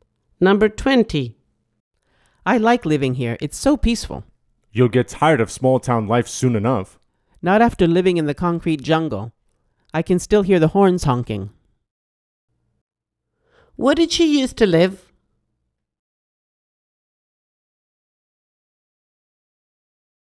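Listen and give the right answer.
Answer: In a city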